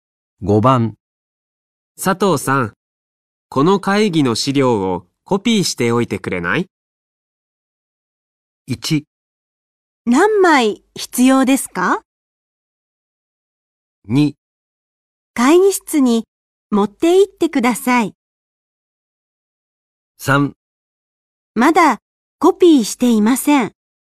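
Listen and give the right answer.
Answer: 1: 何枚必要ですか

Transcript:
1
何枚必要ですか。
2
会議室に持っていってください。
3
まだコピーしていません。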